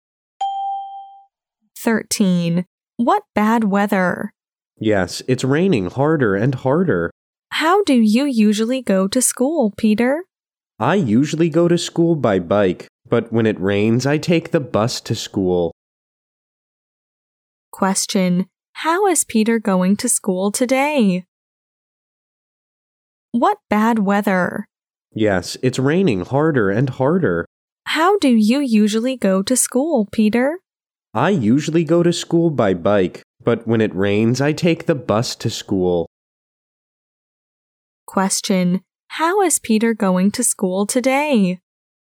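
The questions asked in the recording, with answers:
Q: Question: how is Peter going to school today?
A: By bus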